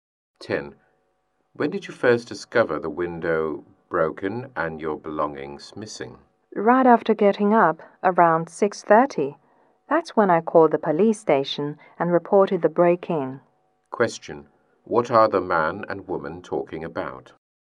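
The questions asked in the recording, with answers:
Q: What are the man and woman talking about?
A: A break-in (burglary)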